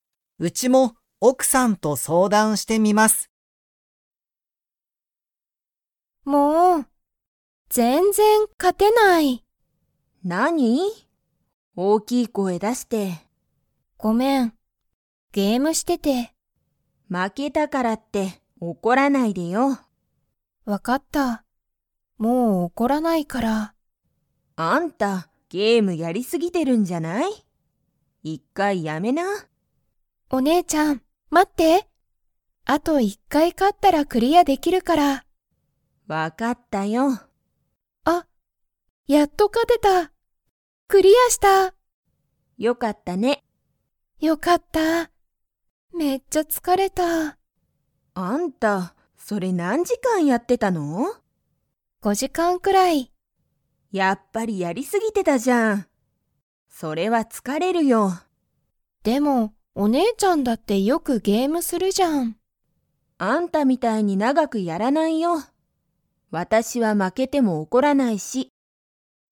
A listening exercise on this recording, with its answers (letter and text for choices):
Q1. サナエは、今いま何なにをしていますか?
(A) 勉強べんきょう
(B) 仕事しごと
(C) ゲーム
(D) スマホ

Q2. ナオコはサナエみたいにゲームを長ながく 。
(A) やる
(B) やらない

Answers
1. (C) ゲーム
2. (B) やらない

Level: Level 4